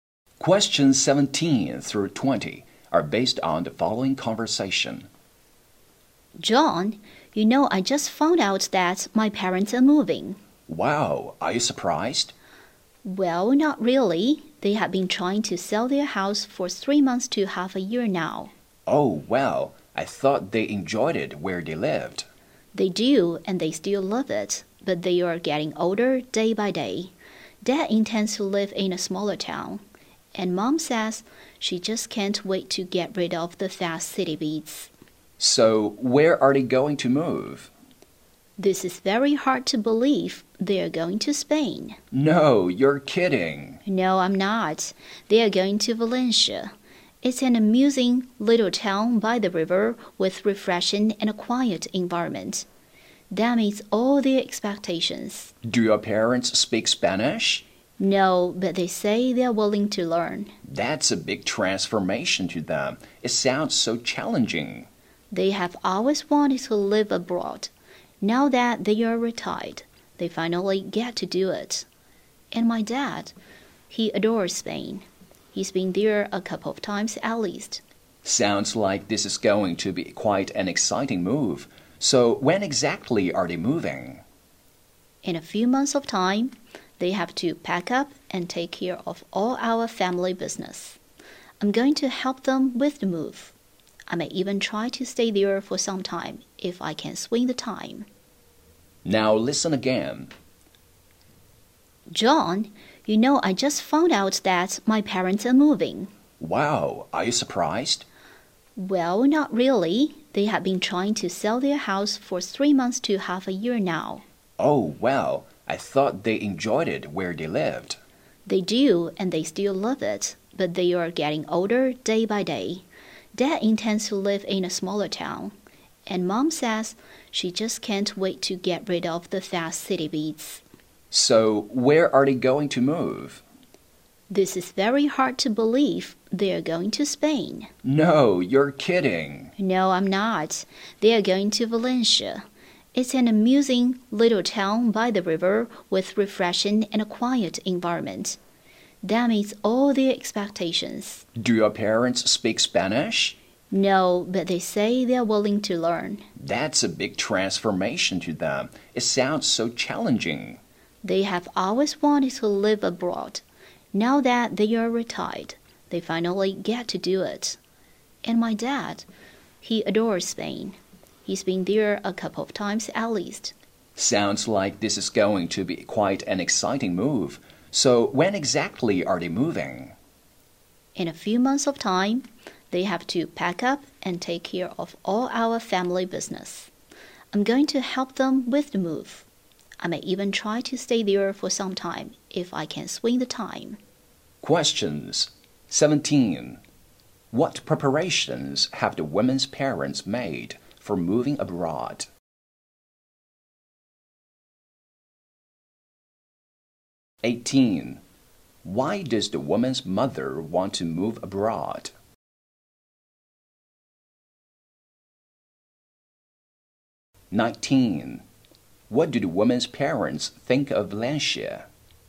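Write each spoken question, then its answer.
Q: What preparations have the women's parents made for moving abroad?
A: They have been trying to sell their house.

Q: Why does the woman's mother want to move abroad?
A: To get away from the fast pace of city life.

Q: What do the woman's parents think of Valencia?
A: It meets all their expectations: a quiet little town by the river.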